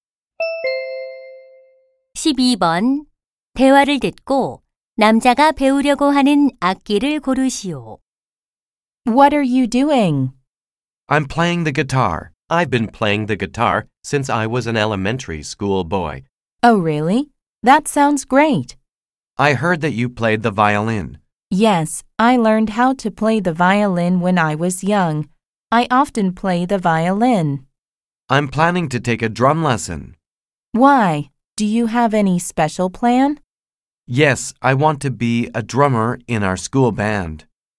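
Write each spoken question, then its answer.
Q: 대화를 듣고 남자가 배우려고 하는 악기를 고르시오.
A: 드럼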